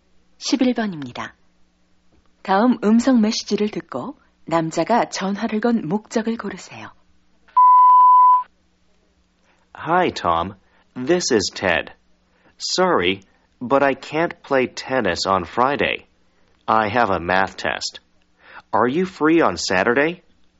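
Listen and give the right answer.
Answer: 금요일 테니스 약속을 취소하고 토요일로 바꾸려고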